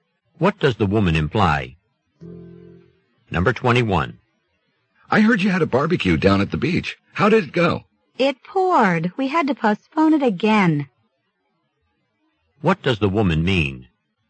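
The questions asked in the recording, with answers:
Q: What does the woman mean?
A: The barbecue was postponed because of rain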